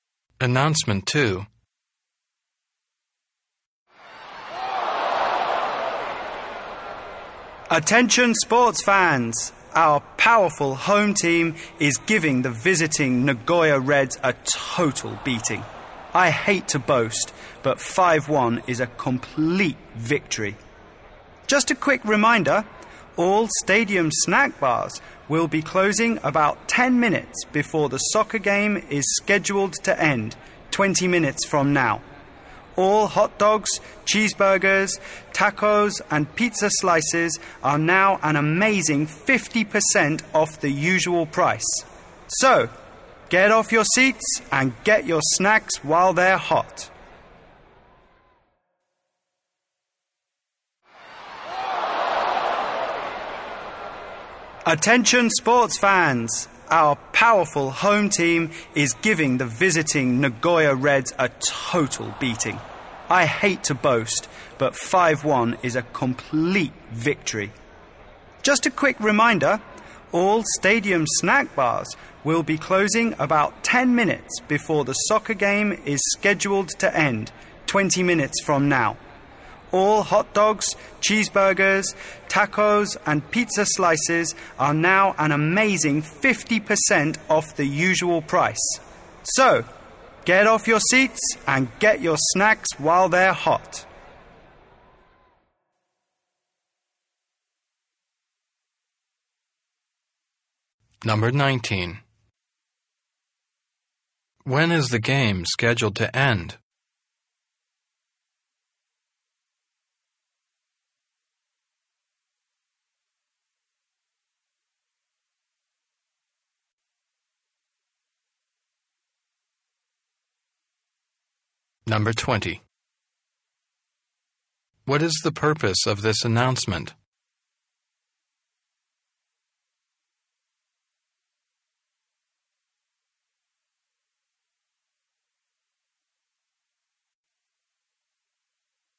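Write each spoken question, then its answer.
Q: What is the purpose of this announcement?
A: To tell fans that the snack bars will close soon and food is 50% off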